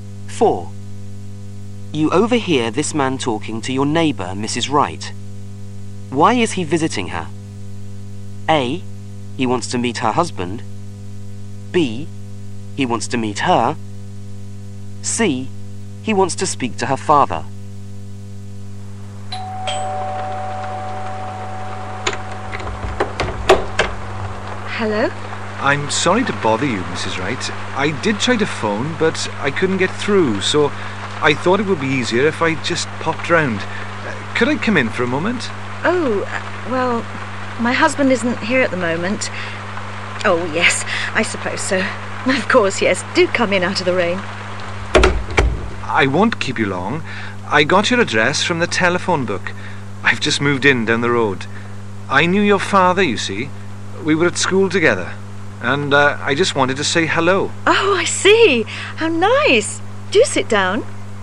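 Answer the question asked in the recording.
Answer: B: He wants to meet her.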